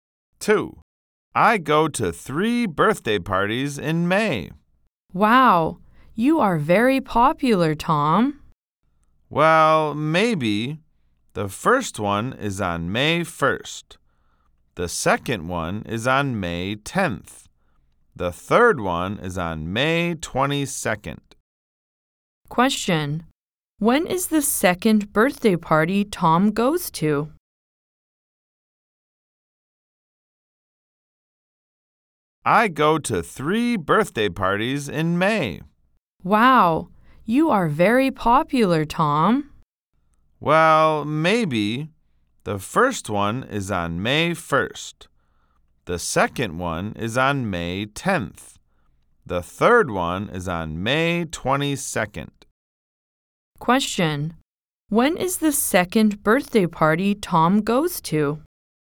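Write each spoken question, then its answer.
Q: Question. When is the second birthday party Tom goes to?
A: May 10th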